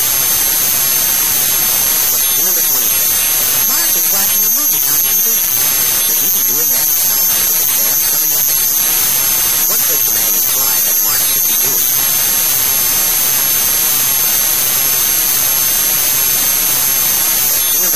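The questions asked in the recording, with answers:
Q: What does the man imply that Mark should be doing?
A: Studying for his exams.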